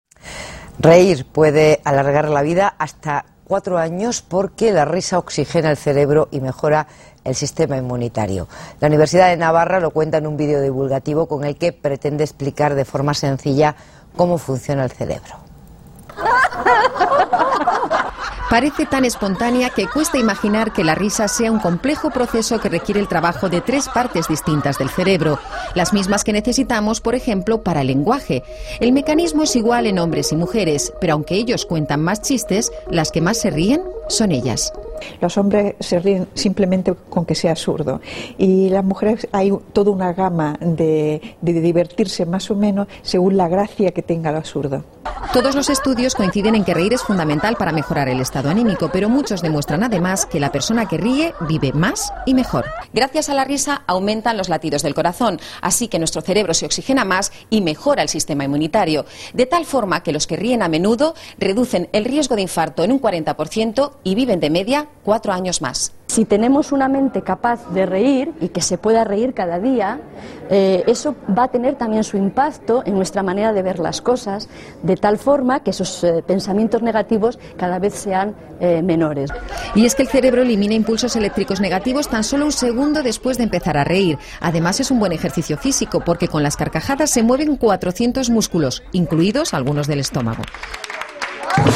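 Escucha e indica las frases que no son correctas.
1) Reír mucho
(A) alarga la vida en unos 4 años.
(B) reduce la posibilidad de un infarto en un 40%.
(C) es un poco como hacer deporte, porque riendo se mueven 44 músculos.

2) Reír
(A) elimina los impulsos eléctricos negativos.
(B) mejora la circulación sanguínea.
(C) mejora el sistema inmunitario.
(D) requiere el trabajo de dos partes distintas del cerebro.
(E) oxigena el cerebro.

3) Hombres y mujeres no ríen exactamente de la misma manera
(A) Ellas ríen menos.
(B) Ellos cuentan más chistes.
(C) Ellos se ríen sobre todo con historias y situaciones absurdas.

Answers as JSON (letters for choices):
{"1": "C", "2": "D", "3": "A"}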